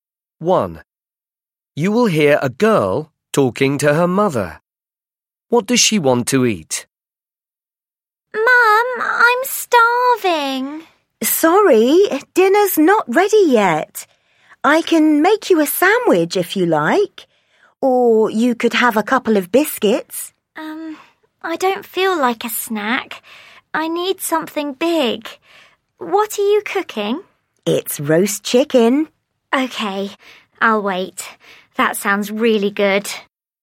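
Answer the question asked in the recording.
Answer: roast chicken (dinner)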